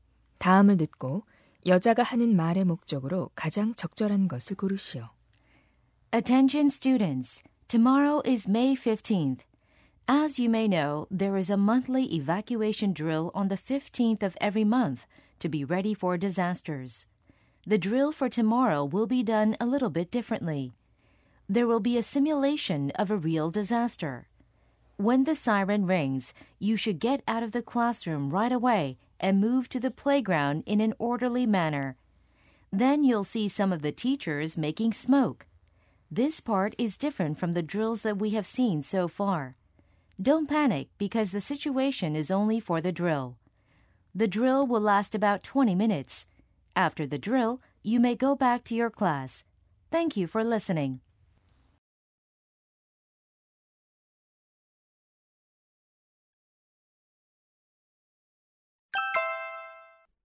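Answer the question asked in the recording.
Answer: 내일 진행되는 달라진 대피 훈련(실제 재난 상황 모의 훈련)을 안내하려고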